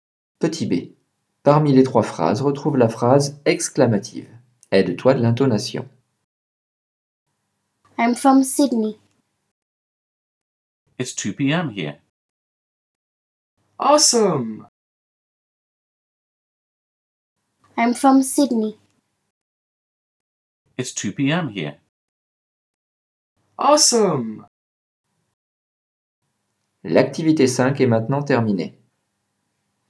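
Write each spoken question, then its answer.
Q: Petit B. Parmi les 3 phrases, retrouve la phrase exclamative.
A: Awesome!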